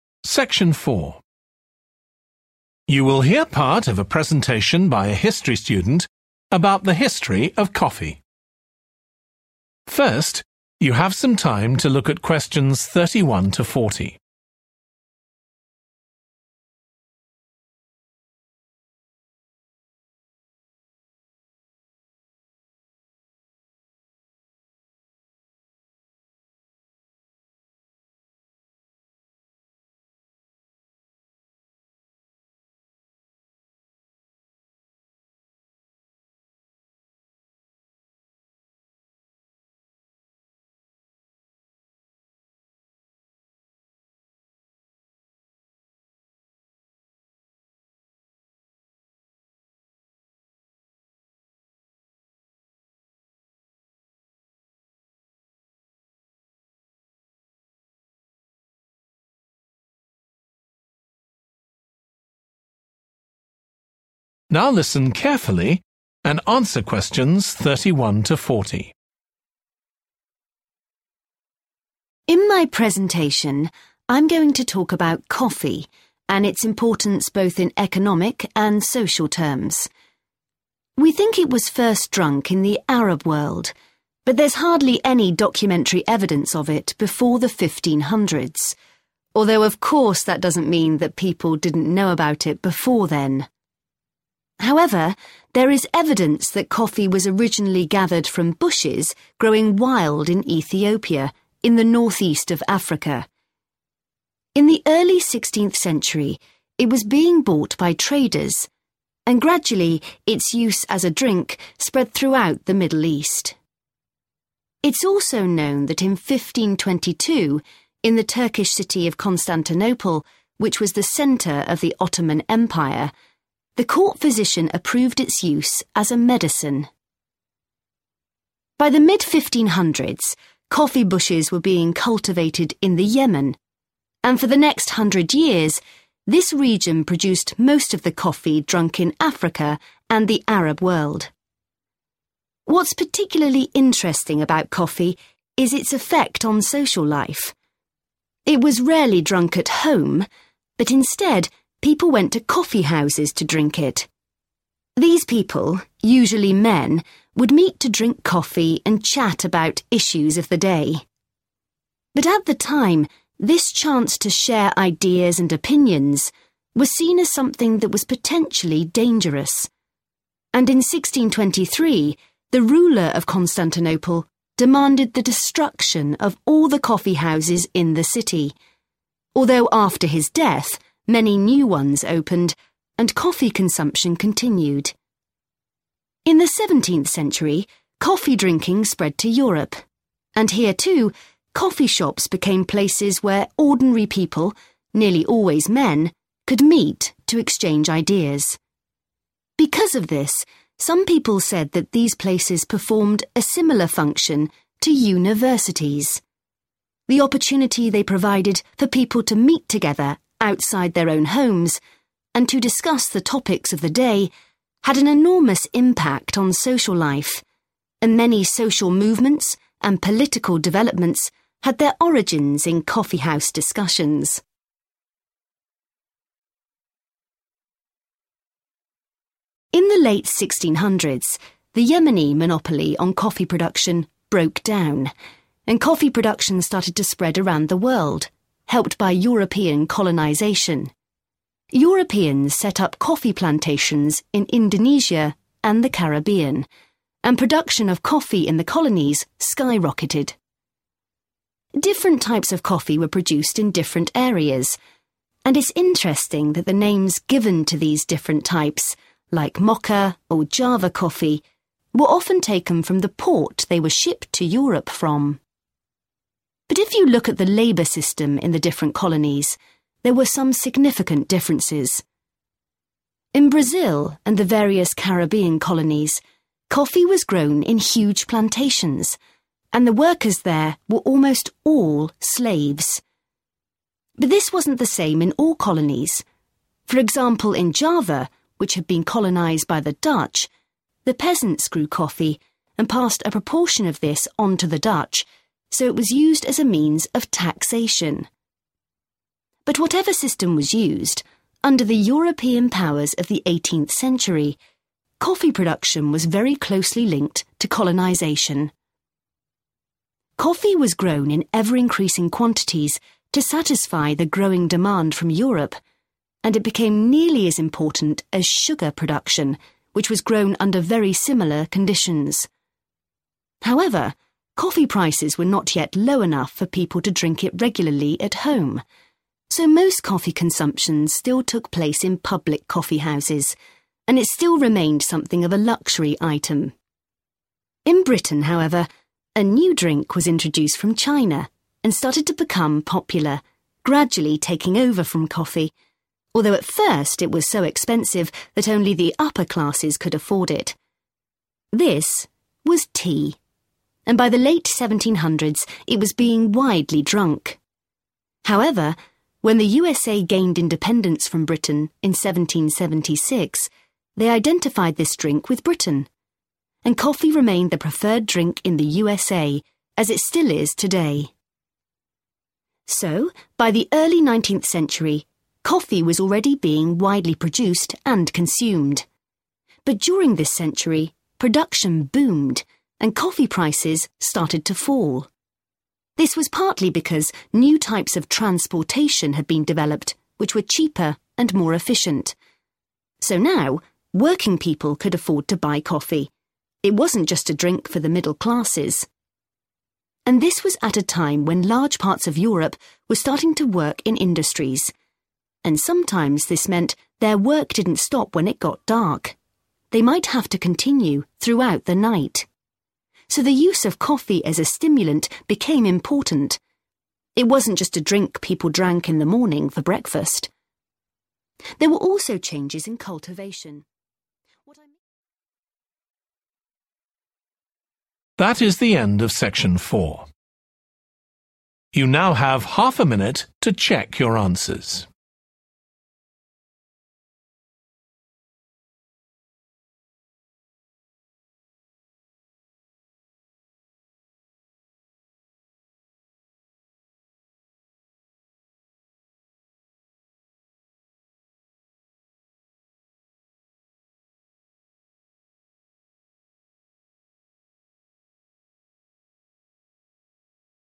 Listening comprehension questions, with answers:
Complete the notes below. Write ONE WORD ONLY for each answer.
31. 1623: In Constantinople, the ruler ordered the 31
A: destruction

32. Coffee shops were compared to 32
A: universities

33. They played an important part in social and 33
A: political

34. Types of coffee were often named according to the 34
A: port